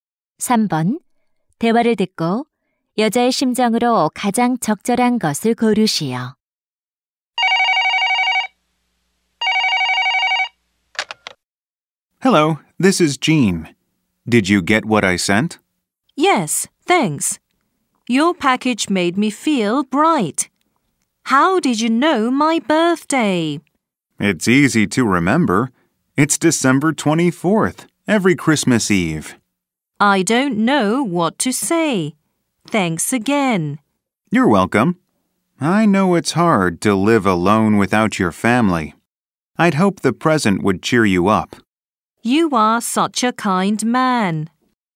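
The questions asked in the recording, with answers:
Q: 대화를 듣고 여자의 심정으로 가장 적절한 것을 고르시오.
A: 고마움, 감동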